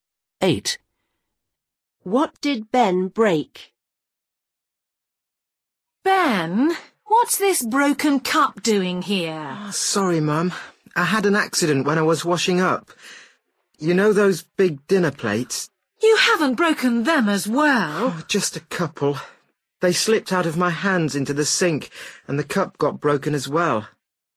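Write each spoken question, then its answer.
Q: What did Ben break?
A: A cup and a couple of big dinner plates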